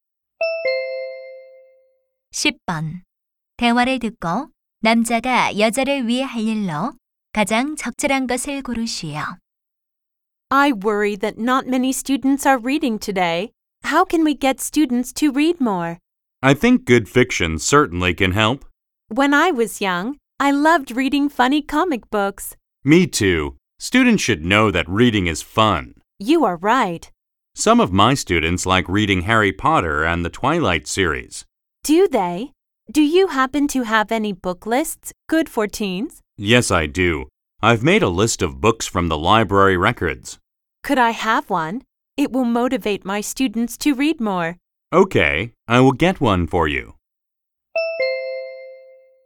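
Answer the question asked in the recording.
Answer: 청소년 추천 도서 목록 갖다 주기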